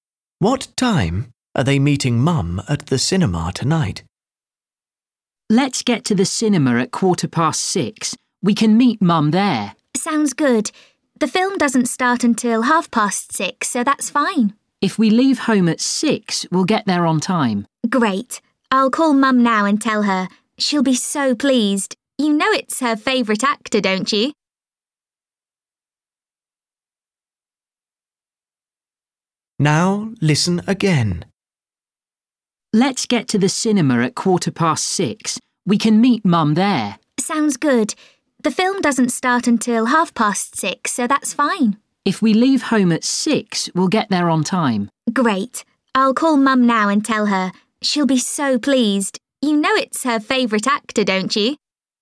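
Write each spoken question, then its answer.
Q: What time are they meeting Mum at the cinema tonight?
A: 6:15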